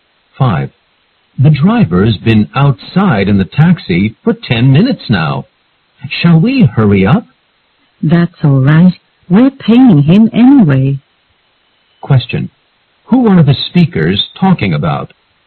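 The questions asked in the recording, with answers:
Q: Who are the speakers talking about?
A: A taxi driver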